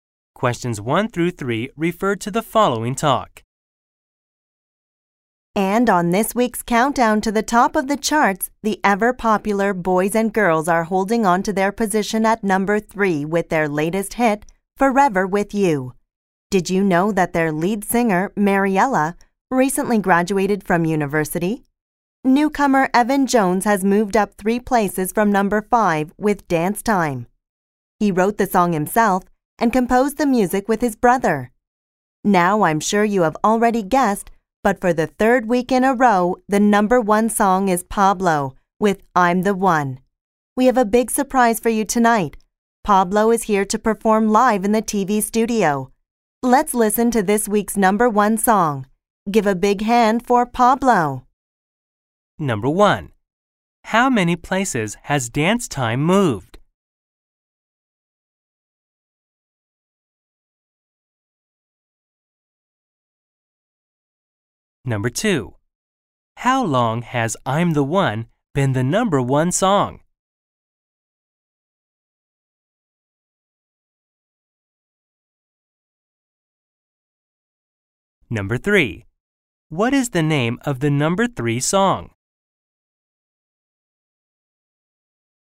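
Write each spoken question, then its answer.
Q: How many places has Dance Time moved?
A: Up 3 places

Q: How long has I'm the One been the number 1 song?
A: 3 weeks

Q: What is the name of the number 3 song?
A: Forever With You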